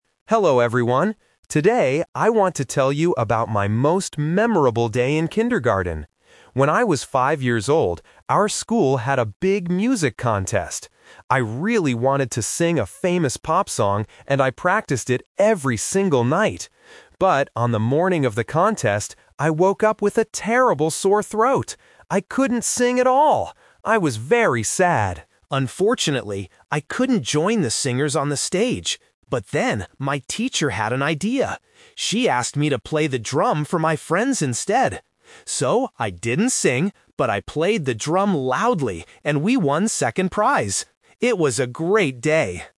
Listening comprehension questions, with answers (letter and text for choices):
Listen to a student giving a short presentation about a kindergarten memory. Then, read the questions below and choose the correct answer (A, B, or C) for each question.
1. What did the student want to do in the contest at first?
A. Play the drum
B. Sing a pop song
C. Dance with friends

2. Why couldn't the student do his original plan?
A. He had a sore throat.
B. He forgot the words.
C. He stayed at home.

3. What did the student do in the end?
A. He sang a different song.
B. He went home early.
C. He played an instrument.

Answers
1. B. Sing a pop song
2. A. He had a sore throat.
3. C. He played an instrument.

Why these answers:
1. The speaker says clearly, "I really wanted to sing a famous pop song." Option (A) is a trap; playing the drum is what he did in the end, not what he wanted to do at first. Option (C) is a plausible activity for a school contest, but it is never mentioned.
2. The speaker says, "I woke up with a terrible sore throat. I couldn't sing at all!" Option (B) is a trap; it is a common reason for failing a performance, but it is not mentioned. Option (C) is a trap; he couldn't go on the stage as a singer, but he didn't stay at home.
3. The speaker says, "She asked me to play the drum for my friends instead. So... I played the drum" (a drum is an instrument). Option (A) is a trap; he says "I didn't sing." Option (B) is a trap; he stayed at the contest and won a prize, he didn't go home early.

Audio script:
Hello everyone. Today, I want to tell you about my most memorable day in kindergarten. When I was five years old, our school had a big music contest. I really wanted to sing a famous pop song, and I practiced it every single night. But, on the morning of the contest, I woke up with a terrible sore throat. I couldn't sing at all! I was very sad. Unfortunately, I couldn't join the singers on the stage. But then, my teacher had an idea. She asked me to play the drum for my friends instead. So, I didn't sing, but I played the drum loudly and we won second prize. It was a great day!